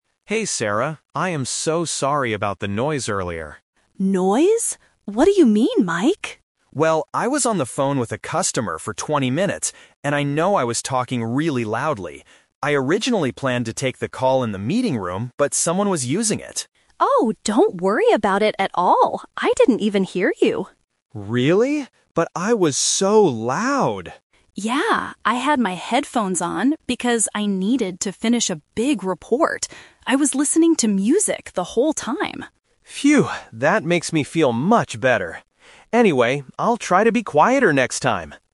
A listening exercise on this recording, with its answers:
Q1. Why is Mike apologizing to Sarah?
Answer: He was talking loudly on the phone.

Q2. Why didn't Mike go to the meeting room?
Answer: Someone else was inside.

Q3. Why wasn't Sarah bothered by the noise?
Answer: She was listening to music.

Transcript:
Mike: Hey, Sarah. I am so sorry about the noise earlier.
Sarah: Noise? What do you mean, Mike?
Mike: Well, I was on the phone with a customer for twenty minutes, and I know I was talking really loudly. I originally planned to take the call in the meeting room, but someone was using it.
Sarah: Oh, don't worry about it at all. I didn't even hear you.
Mike: Really? But I was so loud!
Sarah: Yeah, I had my headphones on because I needed to finish a big report. I was listening to music the whole time.
Mike: Phew! That makes me feel much better. Anyway, I'll try to be quieter next time.